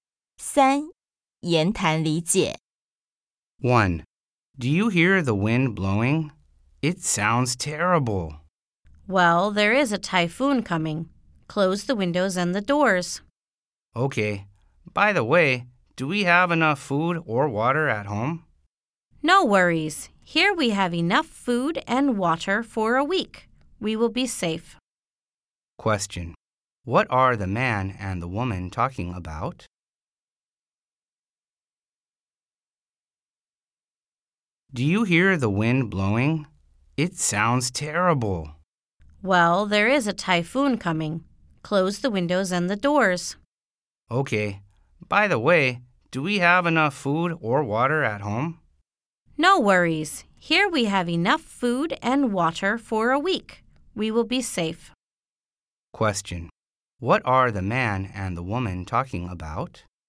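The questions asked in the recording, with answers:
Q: What are the man and the woman talking about?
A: Getting ready for a coming typhoon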